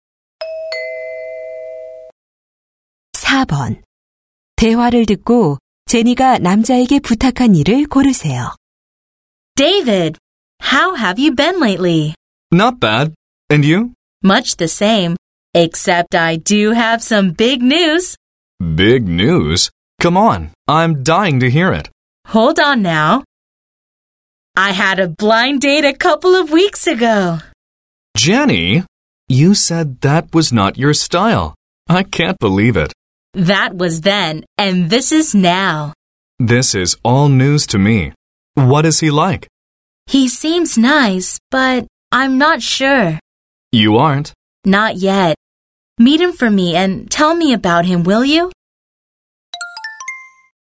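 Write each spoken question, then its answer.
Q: 대화를 듣고 제니가 남자에게 부탁한 일을 고르세요.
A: 소개팅 상대를 만나보고 어떤 사람인지 알려주기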